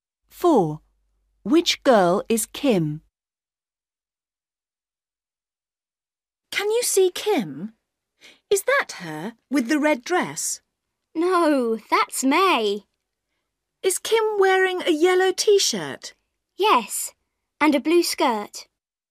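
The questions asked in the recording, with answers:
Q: Which girl is Kim?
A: The girl in a yellow T-shirt and blue skirt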